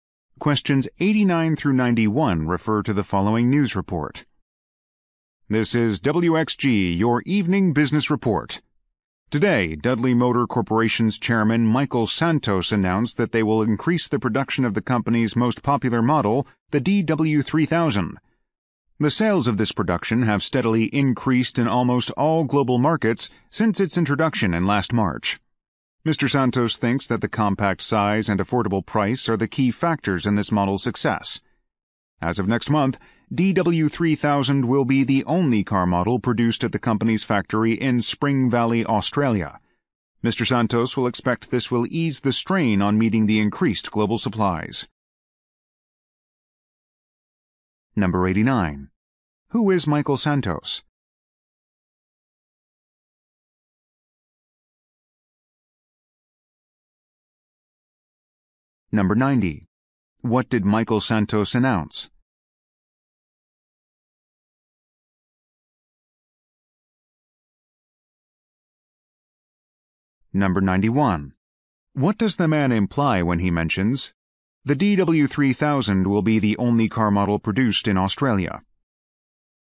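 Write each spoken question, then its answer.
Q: Who is Michael Santos?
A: Chairman of Dudley Motor Corporation

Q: What did Michael Santos announce?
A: Increased production of the DW3000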